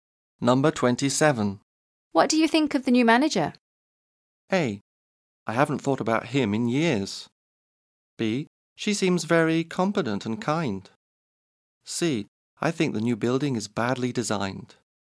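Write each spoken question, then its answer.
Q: What do you think of the new manager?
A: B: She seems very competent and kind.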